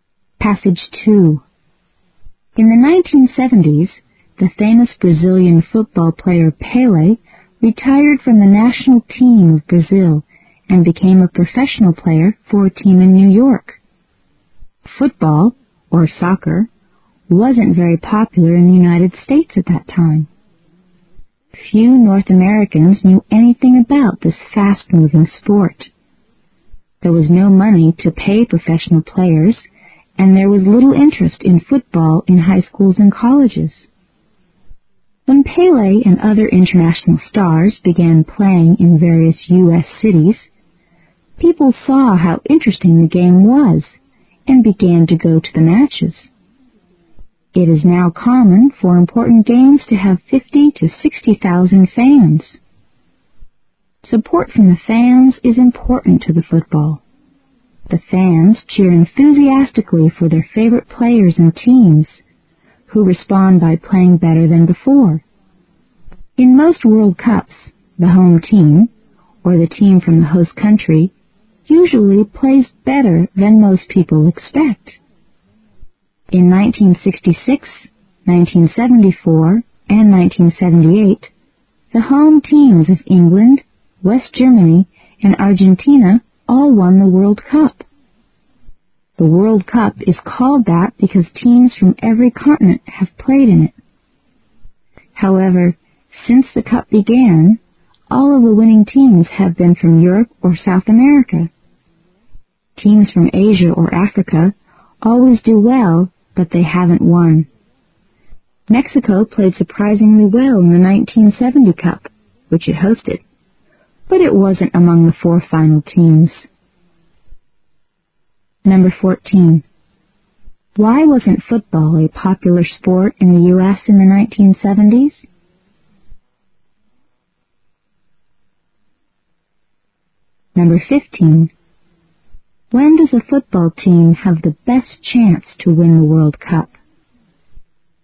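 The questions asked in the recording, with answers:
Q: Why wasn't football a popular sport in the U.S. in the 1970s?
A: Few North Americans knew about it and there was no money to pay professional players

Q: When does a football team have the best chance to win the World Cup?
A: When it is the home team of the host country

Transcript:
In the 1970s, the famous Brazilian football player Pele retired from the national team of Brazil and became a professional player for a team in New York. Football, or soccer, wasn't very popular in the United States at that time. Few North Americans knew anything about this fast-moving sport. There was no money to pay professional players and there was little interest in football in high schools and colleges. When Pele and other international stars began playing in various US cities, people saw how interesting the game was and began to go to the matches. 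It is now common for important games to have fifty to sixty thousand fans. Support from the fans is important to the football. The fans cheer enthusiastically for their favorite players and teams, who respond by playing better than before. In most World Cups, the home team, or the team from the host country usually plays better than most people expect. In 1966, 1974 and 1978, the home teams of England, West Gemp3any and Argentina all won the World Cup. The World Cup is called that because teams from every continent have played in it. However, since the Cup began, all of the winning teams have been from Europe or South America. Teams from Asia or Africa always do well but they haven't yet won. Mexico played surprisingly well in the 1970 Cup, which it hosted, but it wasn't among the 4 final teams.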